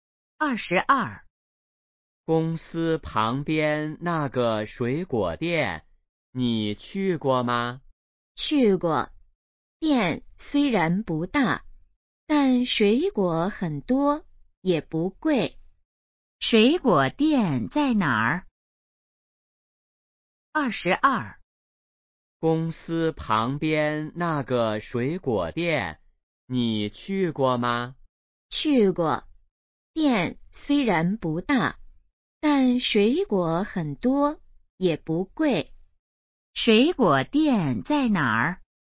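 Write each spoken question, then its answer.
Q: 水果店在哪儿?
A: 公司旁边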